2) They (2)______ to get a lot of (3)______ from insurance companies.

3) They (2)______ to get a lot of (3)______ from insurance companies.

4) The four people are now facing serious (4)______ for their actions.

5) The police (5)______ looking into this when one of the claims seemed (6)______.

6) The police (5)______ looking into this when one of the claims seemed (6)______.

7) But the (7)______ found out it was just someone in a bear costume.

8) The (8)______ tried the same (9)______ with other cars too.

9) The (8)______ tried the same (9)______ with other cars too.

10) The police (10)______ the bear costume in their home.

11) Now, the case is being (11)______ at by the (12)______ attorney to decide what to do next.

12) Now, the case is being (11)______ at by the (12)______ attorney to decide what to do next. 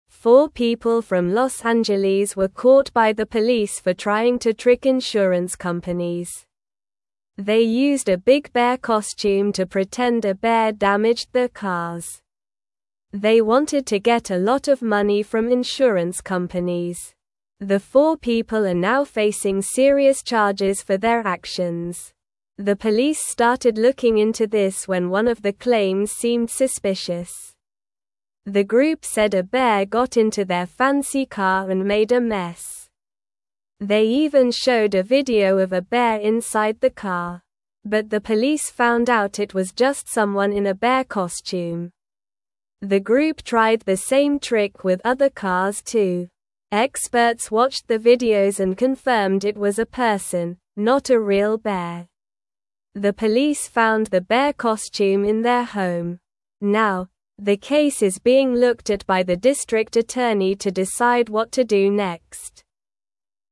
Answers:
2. wanted
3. money
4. charges
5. started
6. suspicious
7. police
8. group
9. trick
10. found
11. looked
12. district

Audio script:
Four people from Los Angeles were caught by the police for trying to trick insurance companies. They used a big bear costume to pretend a bear damaged their cars. They wanted to get a lot of money from insurance companies. The four people are now facing serious charges for their actions.
The police started looking into this when one of the claims seemed suspicious. The group said a bear got into their fancy car and made a mess. They even showed a video of a bear inside the car. But the police found out it was just someone in a bear costume.
The group tried the same trick with other cars too. Experts watched the videos and confirmed it was a person, not a real bear. The police found the bear costume in their home. Now, the case is being looked at by the district attorney to decide what to do next.

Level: Level 2